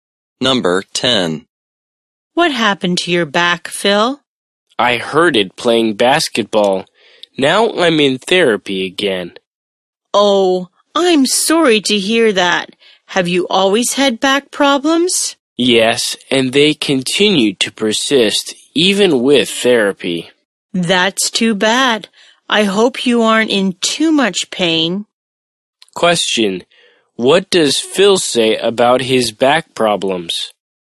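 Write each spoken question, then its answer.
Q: Question: What does Phil say about his back problems?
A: They persist even with therapy.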